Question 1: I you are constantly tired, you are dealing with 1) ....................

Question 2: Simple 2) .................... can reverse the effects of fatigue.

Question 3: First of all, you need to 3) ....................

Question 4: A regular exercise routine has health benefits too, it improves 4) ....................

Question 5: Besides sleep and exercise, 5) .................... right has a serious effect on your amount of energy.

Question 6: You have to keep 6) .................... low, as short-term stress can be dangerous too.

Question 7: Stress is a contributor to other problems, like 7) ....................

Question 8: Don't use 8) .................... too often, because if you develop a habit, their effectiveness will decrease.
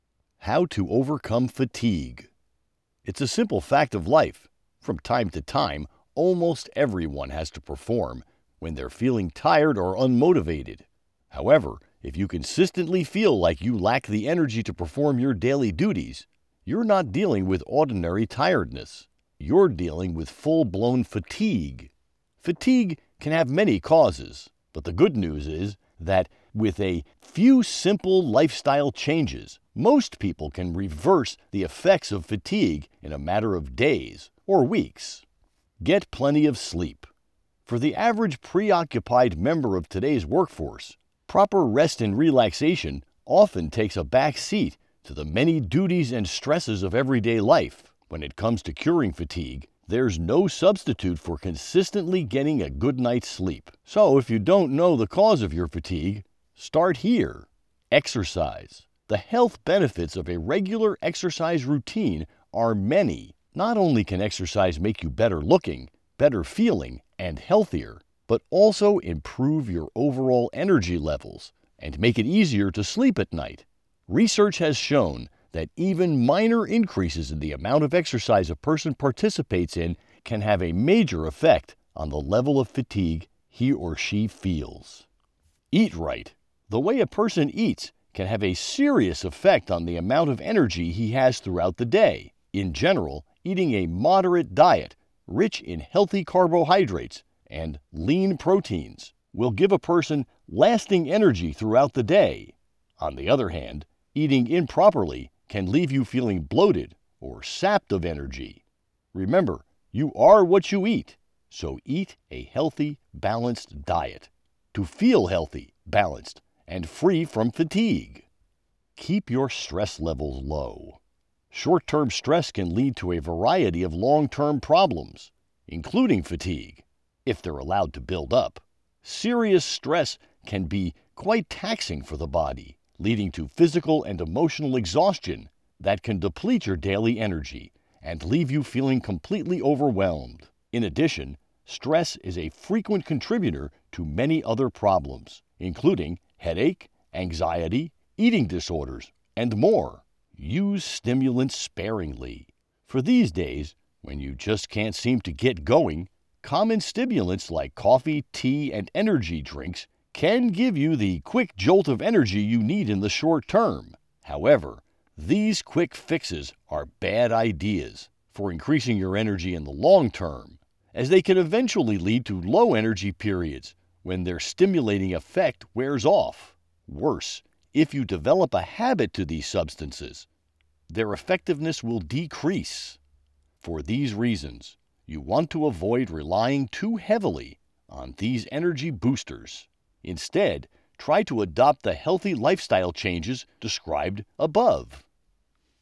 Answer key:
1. fatigue
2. lifestyle changes
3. sleep a lots /sleep more/get a good night's sleep
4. your (overall) energy levels/your sleep
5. eating
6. stress leveles
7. headaches, anxiety, eating disorders, etc.
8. stimulants/coffee, tea, energy drinks

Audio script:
How to overcome fatigue
It's a simple fact of life: from time to time, almost everyone has to perform when they're feeling tired or unmotivated. However, if you consistently feel like you lack the energy to perform your daily duties, you're not dealing with ordinary tiredness — you're dealing with full-blown fatigue. Fatigue can have many causes, but the good news is that with a few simple lifestyle changes, most people can reverse the effects of fatigue in a matter of days or weeks.
Get plenty of sleep. For the average preoccupied member of today's workforce, proper rest and relaxation often takes a backseat to the many duties and stresses of everyday life. When it comes to curing fatigue, there's no substitute for consistently getting a good night's sleep, so if you don't know the cause of your fatigue, start here.
Exercise. The health benefits of a regular exercise routine are many: not only can exercise make you better-looking, better-feeling, and healthier, but also improve your overall energy levels and make it easier to sleep at night. Research has shown that even minor increases in the amount of exercise a person participates in can have a major effect on the level of fatigue she feels.
Eat right. The way a person eats can have a serious effect on the amount of energy he has throughout the day. In general, eating a moderate diet rich in healthy carbohydrates and lean proteins will give a person lasting energy throughout the day. On the other hand, eating improperly can leave you feeling bloated or sapped of energy. Remember, you are what you eat, so eat a healthy, balanced diet to feel healthy, balanced, and free from fatigue.
Keep your stress levels low. Short-term stress can lead to a variety of long-term problems, including fatigue, if they're allowed to build up. Serious stress can be quite taxing for the body, leading to physical and emotional exhaustion that can deplete your daily energy and leave you feeling completely overwhelmed. In addition, stress is a frequent contributor to many other problems, including headache, anxiety, eating disorders, and more.
Use stimulants sparingly. For these days when you just can't seem to get going, common stimulants like coffee, tea and energy drinks can give you the quick "jolt" of energy you need in the short term. However, these quick fixes are bad ideas for increasing your energy in the long term, as they can eventually lead to low-energy periods when their stimulating effect wears off. Worse, if you develop a habit to these substances, their effectiveness will decrease. For these reasons, you'll want to avoid relying to heavily on these energy boosters. Instead, try to adopt the healthy lifestyle changes described above.

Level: középfok (B2)